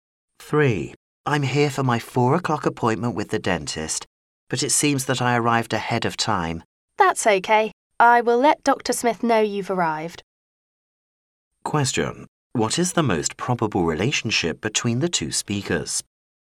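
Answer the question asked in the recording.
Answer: Patient and dentist's receptionist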